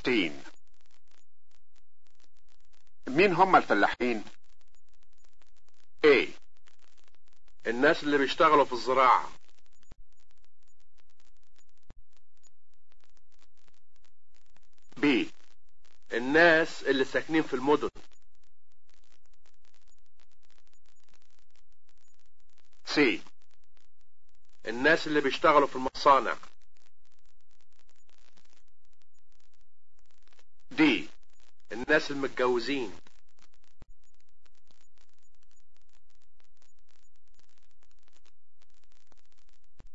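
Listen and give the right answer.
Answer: A: الناس اللي بيشتغلوا في الزراعة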